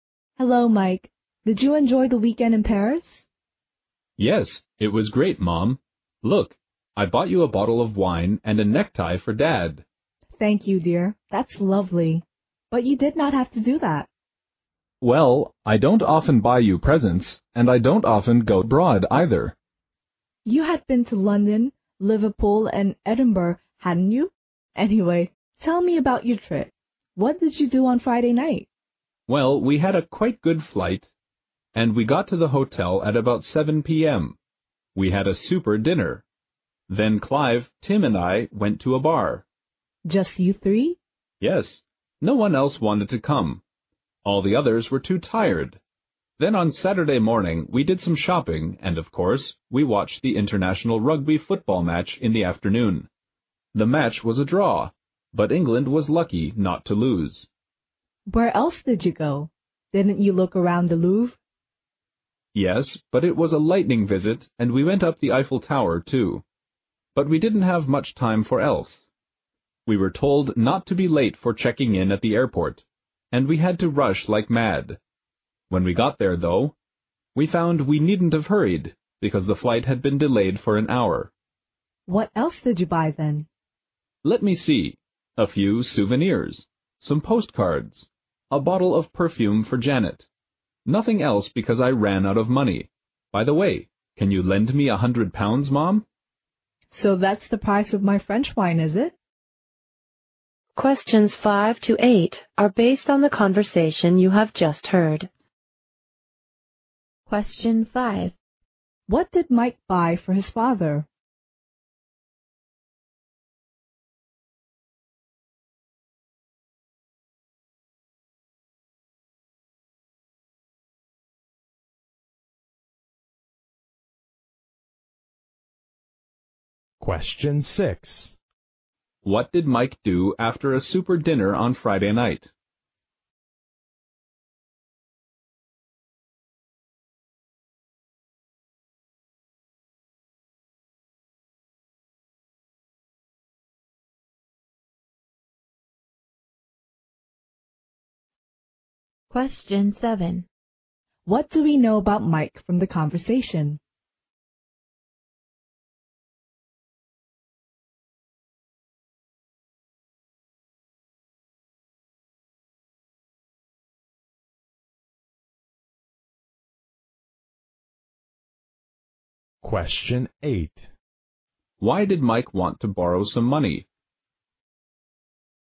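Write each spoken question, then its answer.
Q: What did Mike buy for his father?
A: A necktie

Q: What did Mike do after a super dinner on Friday night?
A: He went to a bar with Clive and Tim

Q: Why did Mike want to borrow some money?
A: He had run out of money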